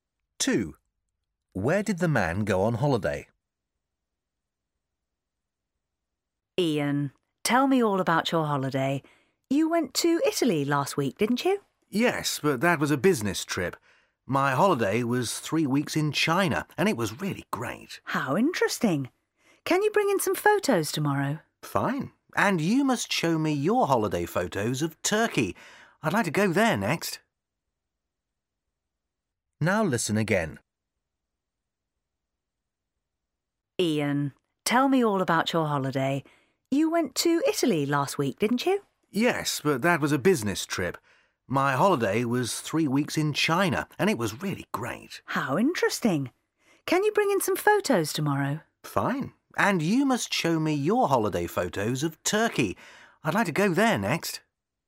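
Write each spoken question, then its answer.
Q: Where did the man go on holiday?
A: China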